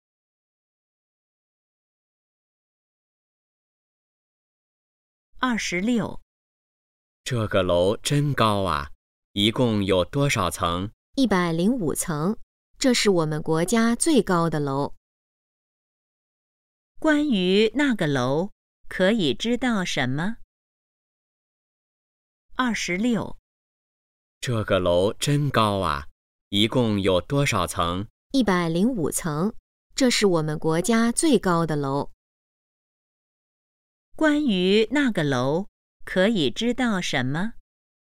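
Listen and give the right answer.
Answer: 有105层,是国家最高的楼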